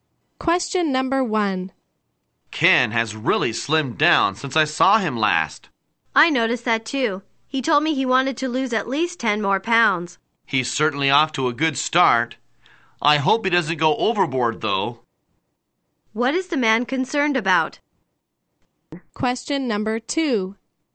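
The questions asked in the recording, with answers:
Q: What is the man concerned about?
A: That Ken may lose too much weight.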